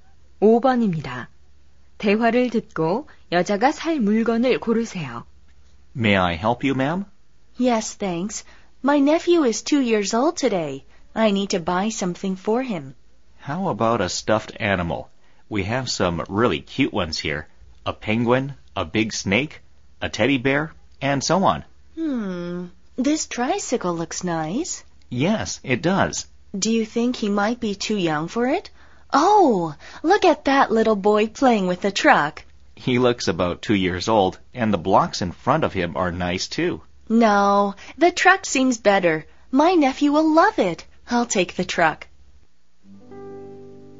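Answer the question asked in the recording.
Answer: 장난감 트럭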